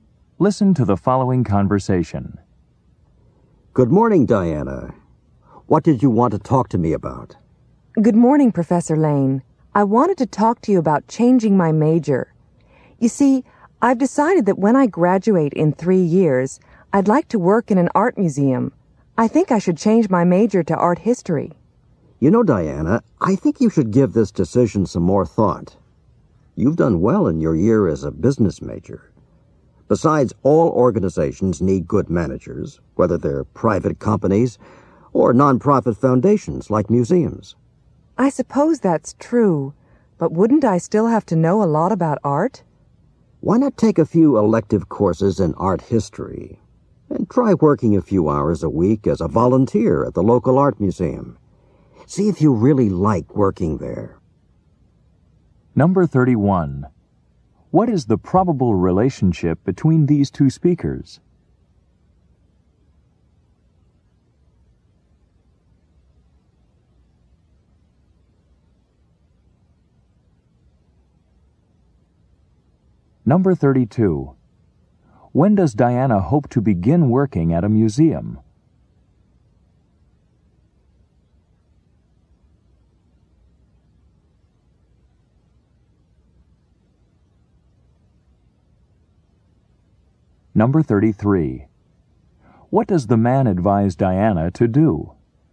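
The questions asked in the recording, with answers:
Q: What is the probable relationship between these two speakers?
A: Student and professor

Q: When does Diana hope to begin working at a museum?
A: After she graduates in 3 years

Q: What does the man advise Diana to do?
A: Take a few art history electives and volunteer at the local art museum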